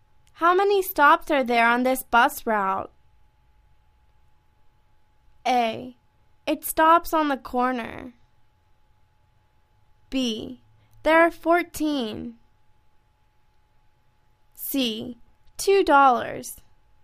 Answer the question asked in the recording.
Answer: There are 14.